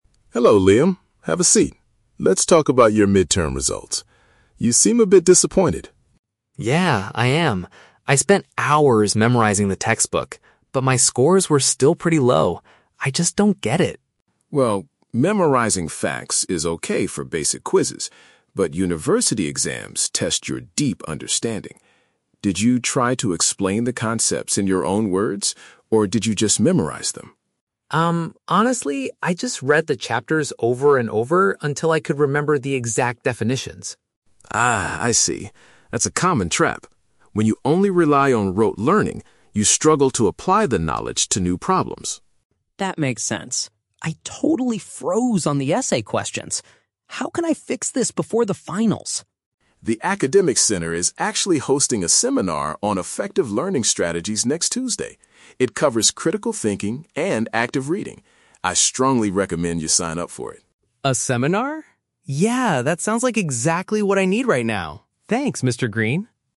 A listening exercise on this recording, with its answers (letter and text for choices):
Listen to the conversation between an academic advisor and a student, then choose the correct answer (A, B, or C) for each question.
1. Why is Liam disappointed about his midterm exams?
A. He missed the test because he read the wrong chapter.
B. His grades were much worse than he anticipated.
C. The professor asked questions that were not in the book.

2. According to Mr. Green, what was the main flaw in Liam's study method?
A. He focused on repeating information without truly comprehending it.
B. He spent too few hours reviewing the assigned materials.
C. He forgot to write down the definitions during the lecture.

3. What does the advisor suggest Liam should do next week?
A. Ask the professor to let him retake the midterm exam.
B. Buy a new book about critical thinking and active reading.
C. Attend a training session to improve his academic techniques.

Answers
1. B. His grades were much worse than he anticipated.
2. A. He focused on repeating information without truly comprehending it.
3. C. Attend a training session to improve his academic techniques.

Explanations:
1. Liam says his "scores were still pretty low." Option B paraphrases this perfectly as his grades being "worse than he anticipated." Option A is not mentioned. Option C is a trap; the textbook is mentioned, but he never says the questions were not in the book.
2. Mr. Green says, "When you only rely on rote learning, you struggle to apply the knowledge." Liam also admits he "just read the chapters over and over until I could remember the exact definitions." Option A perfectly paraphrases this as repeating information without comprehending (understanding) it. Option B is a trap because Liam actually "spent hours" studying, so he didn't spend "too few hours." Option C is not mentioned.
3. Mr. Green recommends that Liam sign up for a "seminar on effective learning strategies." Option C paraphrases this as a "training session to improve his academic techniques." Option A is a trap; fixing the issue before finals is mentioned, but retaking the midterm is not. Option B is a trap; "critical thinking and active reading" are the topics of the seminar, not a book he needs to buy.

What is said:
Mr. Green: Hello, Liam. Have a seat. Let's talk about your midterm results. You seem a bit disappointed.
Liam: Yeah, I am. I spent hours memorizing the textbook, but my scores were still pretty low. I just don't get it.
Mr. Green: Well, memorizing facts is okay for basic quizzes, but university exams test your deep understanding. Did you try to explain the concepts in your own words, or did you just memorize them?
Liam: Um, honestly, I just read the chapters over and over until I could remember the exact definitions.
Mr. Green: Ah, I see. That's a common trap. When you only rely on rote learning, you struggle to apply the knowledge to new problems.
Liam: That makes sense. I totally froze on the essay questions. How can I fix this before the finals?
Mr. Green: The academic center is actually hosting a seminar on effective learning strategies next Tuesday. It covers critical thinking and active reading. I strongly recommend you sign up for it.
Liam: A seminar? Yeah, that sounds like exactly what I need right now. Thanks, Mr. Green.